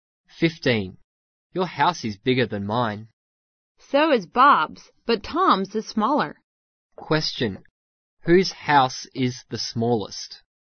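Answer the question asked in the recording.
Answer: Tom's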